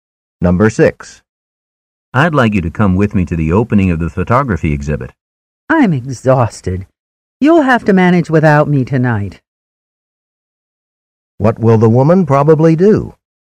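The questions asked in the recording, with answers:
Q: What will the woman probably do?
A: Stay home and rest instead of going to the exhibit.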